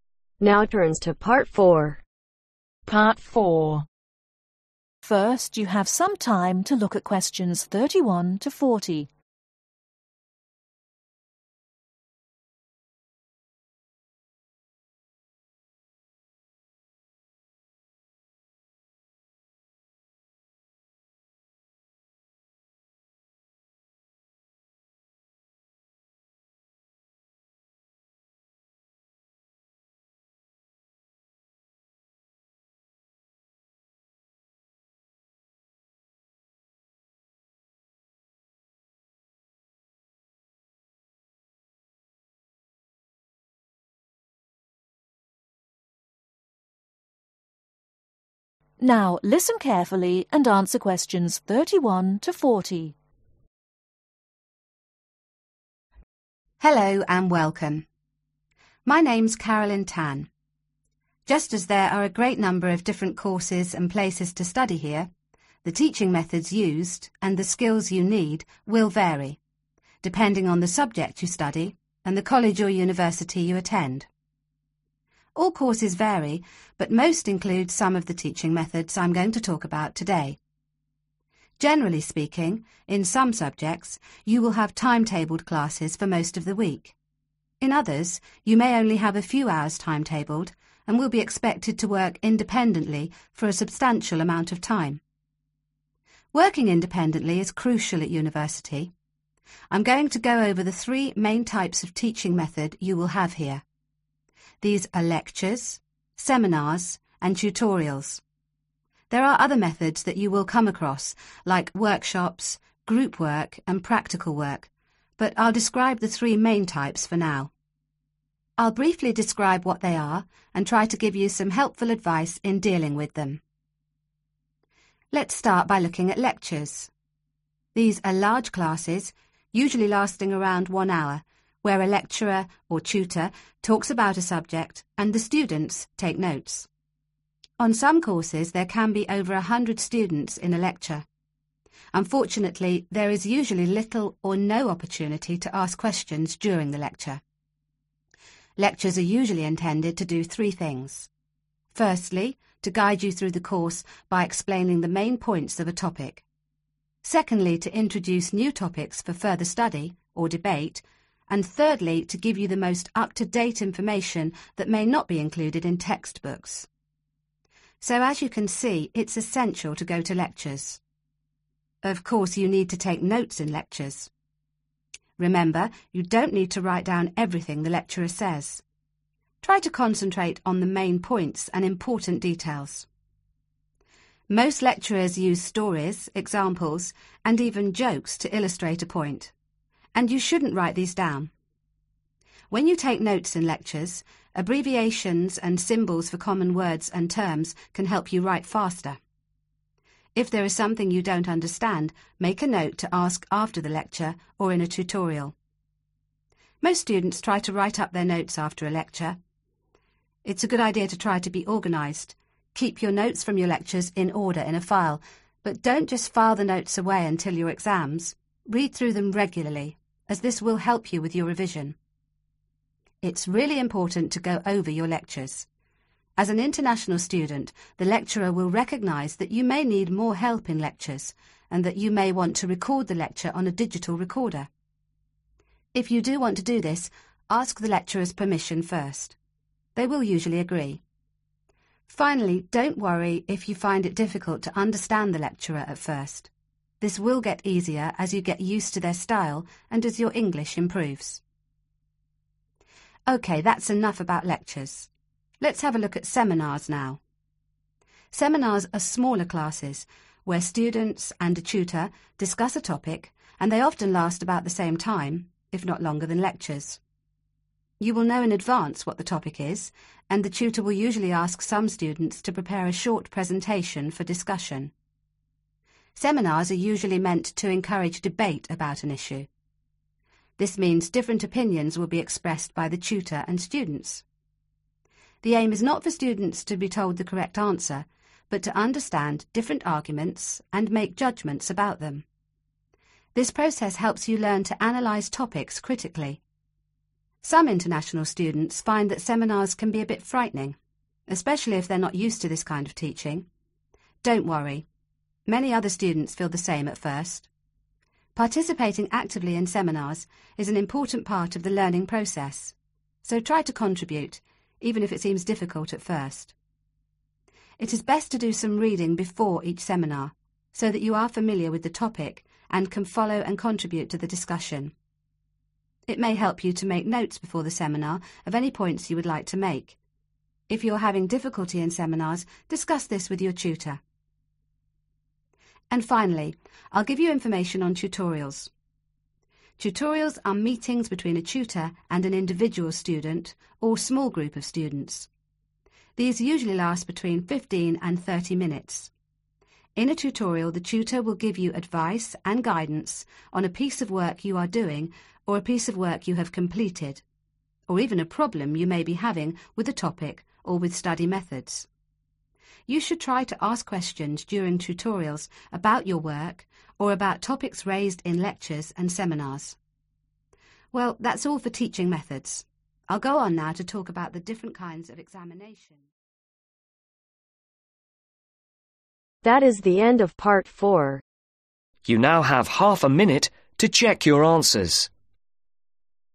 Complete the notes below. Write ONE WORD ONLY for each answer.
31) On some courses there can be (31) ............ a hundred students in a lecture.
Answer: over

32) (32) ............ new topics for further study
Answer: introduce

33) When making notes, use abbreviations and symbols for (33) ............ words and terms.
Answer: common

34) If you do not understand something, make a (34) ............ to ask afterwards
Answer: note

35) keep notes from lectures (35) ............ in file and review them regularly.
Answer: order

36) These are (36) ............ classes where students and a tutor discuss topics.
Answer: smaller

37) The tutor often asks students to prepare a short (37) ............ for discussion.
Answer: presentation

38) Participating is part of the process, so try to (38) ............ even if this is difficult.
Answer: contribute

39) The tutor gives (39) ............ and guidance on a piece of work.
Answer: advice

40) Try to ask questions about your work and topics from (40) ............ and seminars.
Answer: lectures